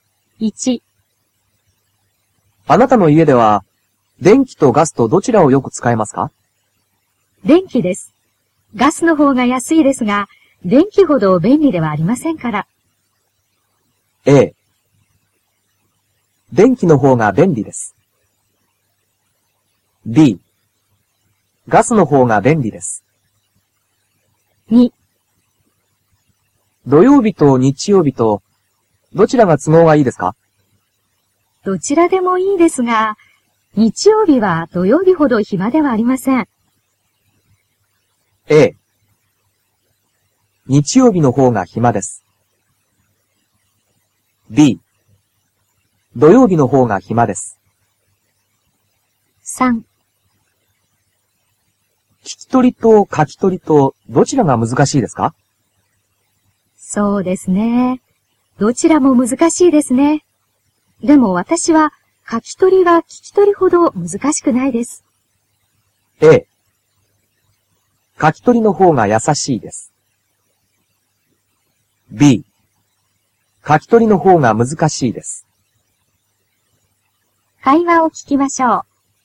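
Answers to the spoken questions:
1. A: 電気の方が便利です。
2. B: 土曜日の方が暇です。
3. A: 書き取りの方が優しいです。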